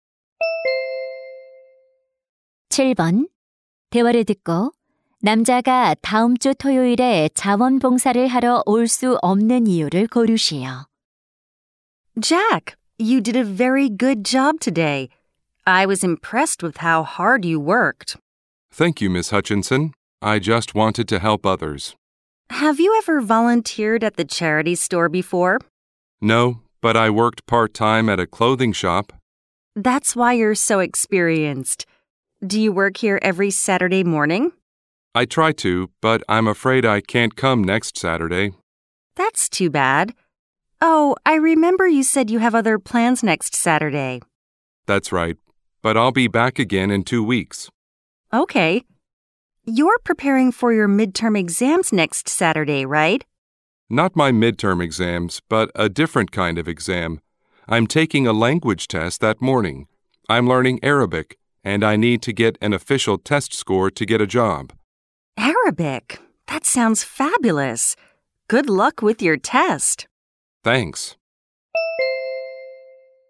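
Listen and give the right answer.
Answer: 언어 시험(아랍어)을 치러야 해서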